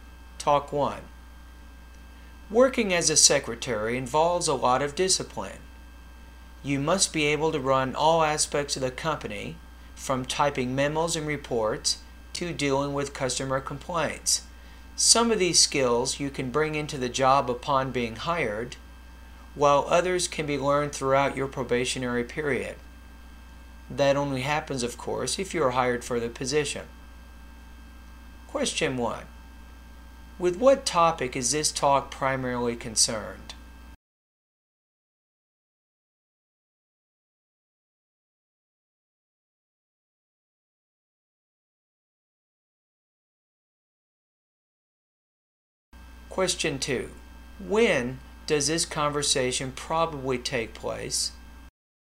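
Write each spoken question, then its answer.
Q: With what topic is this talk primarily concerned?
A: The skills and duties of a secretary's job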